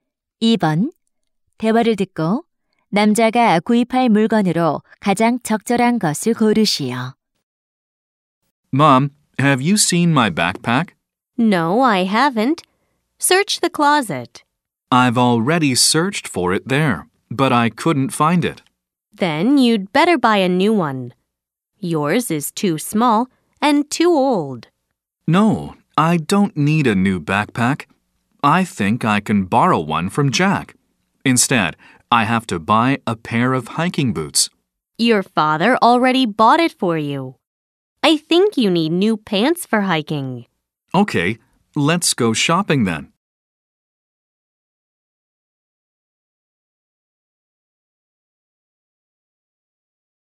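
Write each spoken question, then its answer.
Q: 대화를 듣고 남자가 구입할 물건으로 가장 적절한 것을 고르시오.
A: 등산 바지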